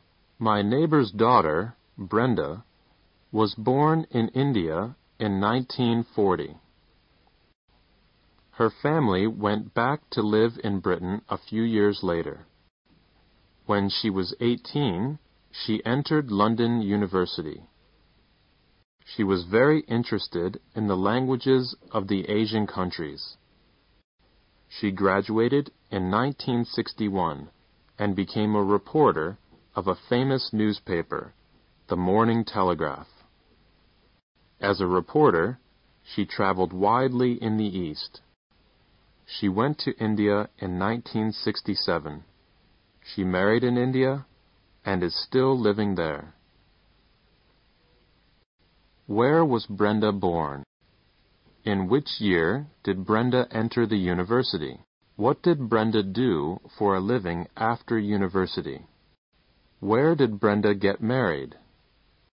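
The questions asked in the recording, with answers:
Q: Where was Brenda born?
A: In India

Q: In which year did Brenda enter the university?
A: 1958

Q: What did Brenda do for a living after university?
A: She was a reporter

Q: Where did Brenda get married?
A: In India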